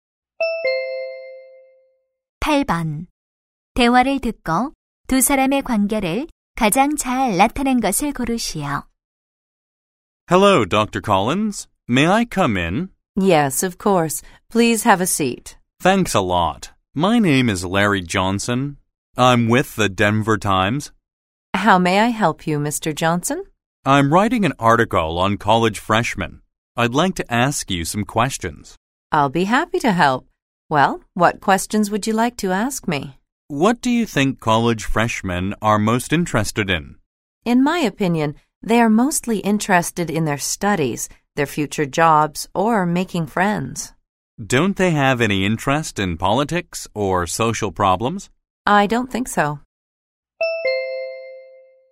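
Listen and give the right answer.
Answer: 기자 - 교수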